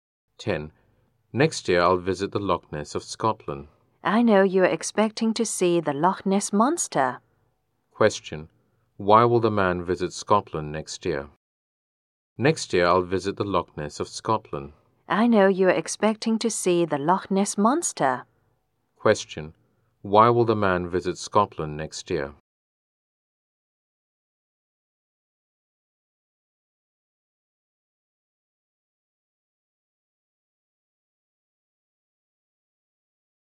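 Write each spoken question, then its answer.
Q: Why will the man visit Scotland next year?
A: To see the Loch Ness Monster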